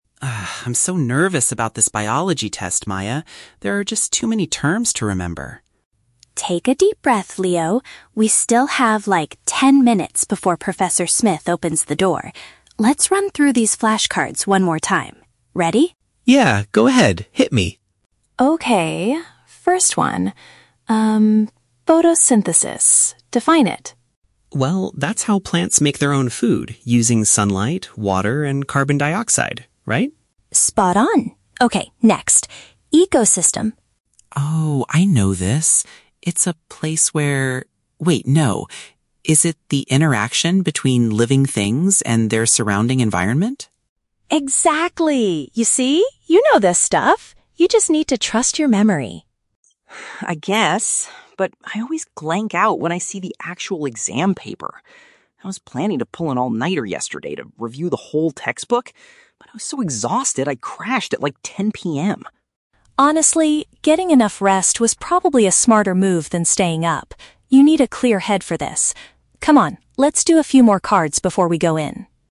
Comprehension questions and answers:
Listen to the conversation between two students and choose the correct answer (A, B, or C) for each question.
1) How does Leo feel about the upcoming assessment?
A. He is confident because he studied all night.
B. He is anxious because of the massive amount of information to memorize.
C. He is frustrated because the professor didn't give them enough time.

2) What did Leo actually do the night before the test?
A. He fell asleep quite early.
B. He reviewed his textbook until the morning.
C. He practiced defining terms with Maya.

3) What is Maya's opinion regarding Leo's preparation?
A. She is annoyed that he almost forgot the definition of 'ecosystem'.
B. She thinks they should skip the test and keep practicing outside.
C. She believes resting was more beneficial for him than studying late.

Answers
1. B. He is anxious because of the massive amount of information to memorize.
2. A. He fell asleep quite early.
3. C. She believes resting was more beneficial for him than studying late.

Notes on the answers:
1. Leo says, "I'm so nervous about this biology test... There are just too many terms to remember." "Nervous" is paraphrased as "anxious," and "too many terms" matches "massive amount of information." Option A is a trap because he originally planned to study all night but didn't. Option C is not mentioned.
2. In the audio, Leo says, "I crashed at like 10 p.m." which means he went to sleep early. Option B is a trap; he planned to pull an all-nighter (stay up all night studying) but failed to do so. Option C is also a trap; he is practicing with Maya now, right before the test, not the night before.
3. Maya tells Leo, "getting enough rest was probably a smarter move than staying up." This perfectly matches the idea that resting was more beneficial than studying late. Option A is a trap; she isn't annoyed at all, she actually encourages him ("Exactly! You see? You know this stuff"). Option B is not mentioned.

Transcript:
Leo: Ah, I'm so nervous about this biology test, Maya. There are just too many terms to remember!
Maya: Take a deep breath, Leo. We still have, like, ten minutes before Professor Smith opens the door. Let's run through these flashcards one more time. Ready?
Leo: Yeah, go ahead. Hit me.
Maya: Okay, first one. Um... Photosynthesis. Define it.
Leo: Well, that's how plants make their own food using sunlight, water, and carbon dioxide. Right?
Maya: Spot on. Okay, next... Ecosystem.
Leo: Oh, I know this. It's a place where... wait, no. Is it the interaction between living things and their surrounding environment?
Maya: Exactly! You see? You know this stuff. You just need to trust your memory.
Leo: I guess. But I always blank out when I see the actual exam paper. I was planning to pull an all-nighter yesterday to review the whole textbook, but I was so exhausted I crashed at like 10 p.m.
Maya: Honestly, getting enough rest was probably a smarter move than staying up. You need a clear head for this. Come on, let's do a few more cards before we go in.

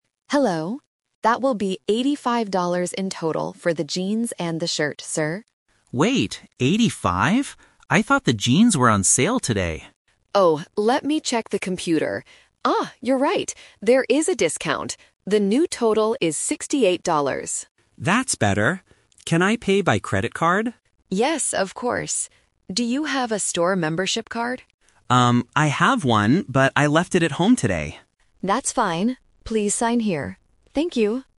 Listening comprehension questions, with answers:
Listen to the conversation and choose the correct answer (A, B, or C) for each question.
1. What was the first price the cashier mentioned?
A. Sixty-eight dollars.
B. Eighty-five dollars.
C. Fifty dollars.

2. How much does the customer have to pay in the end?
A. $85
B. $68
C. $20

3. Why didn't the customer use his membership card?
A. Because he doesn't have one.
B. Because he forgot it.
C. Because it is broken.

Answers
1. B. Eighty-five dollars.
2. B. $68
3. B. Because he forgot it.

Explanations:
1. The cashier starts the conversation by saying, "That will be eighty-five dollars in total..." Why the trap is wrong: Option (A) is the final price after the discount. Option (C) is not mentioned.
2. This is "The Twist". After checking the discount, the cashier says, "The new total is sixty-eight dollars." Why the trap is wrong: Option (A) is the price before the discount. A2 learners must listen to the correction to get the final answer.
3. When asked about the card, the customer says, "I have one, but I left it at home today." This means he forgot to bring it. Why the trap is wrong: Option (A) is wrong because he says "I have one." Option (C) is a plausible reason for a card not working but is not mentioned in the dialogue.

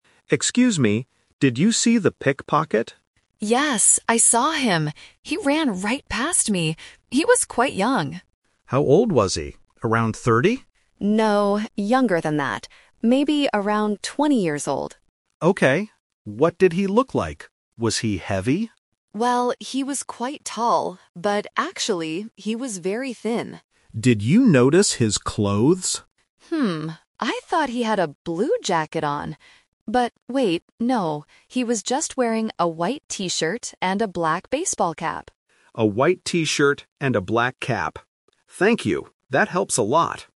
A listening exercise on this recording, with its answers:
Listen to the conversation between a police officer and a witness, and choose the correct answer (A, B, or C).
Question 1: How old is the pickpocket?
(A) Around 20 years old.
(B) Around 30 years old.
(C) Around 40 years old.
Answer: (A) Around 20 years old.

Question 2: What does the pickpocket look like?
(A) He is short and heavy.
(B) He is tall and heavy.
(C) He is tall and very thin.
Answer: (C) He is tall and very thin.

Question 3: What was the pickpocket wearing?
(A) A blue jacket.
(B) A white T-shirt and a black cap.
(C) A black T-shirt and a blue cap.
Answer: (B) A white T-shirt and a black cap.

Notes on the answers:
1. The witness says the pickpocket was "Maybe around twenty years old."
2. The witness describes him by saying, "he was quite tall, but actually he was very thin."
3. The witness corrects their memory and states, "he was just wearing a white T-shirt and a black baseball cap."

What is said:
Police Officer: Excuse me, did you see the pickpocket?
Witness: Yes, I saw him! He ran right past me. He was quite young.
Police Officer: How old was he? Around thirty?
Witness: No, younger than that. Maybe around twenty years old.
Police Officer: Okay. What did he look like? Was he heavy?
Witness: Well, he was quite tall, but actually he was very thin.
Police Officer: Did you notice his clothes?
I thought he had a blue jacket on. But wait, no, he was just wearing a white T-shirt and a black baseball cap.

